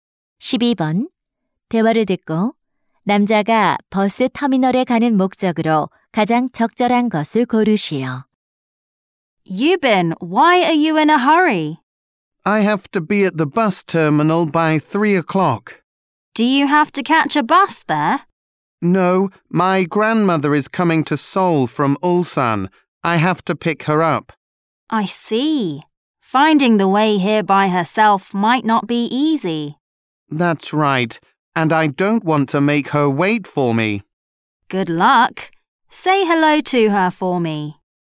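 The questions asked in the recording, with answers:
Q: 대화를 듣고 남자가 버스 터미널에 가는 목적으로 가장 적절한 것을 고르시오.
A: 할머니를 마중하러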